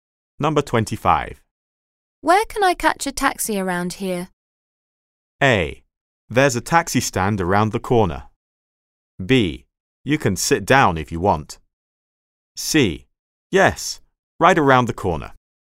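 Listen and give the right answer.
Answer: A: There's a taxi stand around the corner.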